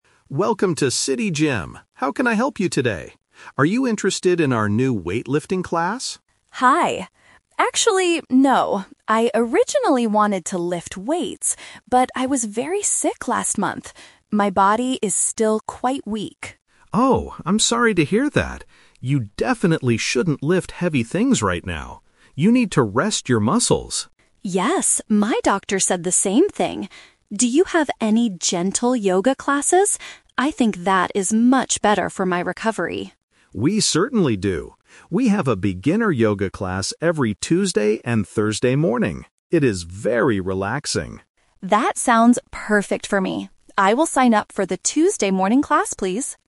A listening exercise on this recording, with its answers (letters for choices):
Listen to a conversation between a customer and a gym trainer. Choose the correct answer (A, B, or C) for each question.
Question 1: What did the woman originally want to do at the gym?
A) Join a relaxing yoga class.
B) Swim in the gym's pool.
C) Lift heavy weights.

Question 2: Why does the woman feel weak today?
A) She was very sick last month.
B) She lifted heavy things yesterday.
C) She worked too hard at her office.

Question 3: Which class does she decide to take?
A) A weightlifting class on Thursday morning.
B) A beginner yoga class on Tuesday morning.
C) A gentle yoga class on Thursday afternoon.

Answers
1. C
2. A
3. B

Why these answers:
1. The woman explicitly says, "I originally wanted to lift weights..." The Trap: Option A is the A2 "Twist" trap. She joins the yoga class now, but it was not what she originally wanted to do before she got sick. Option B is a plausible gym activity but is never mentioned.
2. The woman says, "I was very sick last month. My body is still quite weak." The Trap: Option B is a trap. The trainer tells her she "shouldn't lift heavy things right now," but she did not do it yesterday. Option C is a plausible reason for feeling tired, but it is not in the audio.
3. At the end, the woman says, "I will sign up for the Tuesday morning class." The Trap: Option A is a trap because it mixes the day (Thursday) with the wrong activity (weightlifting). Option C is a trap because the class is in the morning, not the afternoon.

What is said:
Trainer: Welcome to City Gym! How can I help you today? Are you interested in our new weightlifting class?
Customer: Hi. Actually, no. I originally wanted to lift weights, but I was very sick last month. My body is still quite weak.
Trainer: Oh, I'm sorry to hear that. You definitely shouldn't lift heavy things right now. You need to rest your muscles.
Customer: Yes, my doctor said the same thing. Do you have any gentle yoga classes? I think that is much better for my recovery.
Trainer: We certainly do. We have a beginner yoga class every Tuesday and Thursday morning. It is very relaxing.

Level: A2